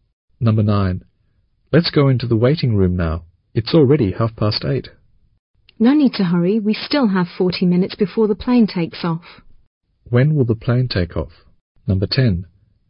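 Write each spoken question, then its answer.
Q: When will the plane take off?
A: At 9:10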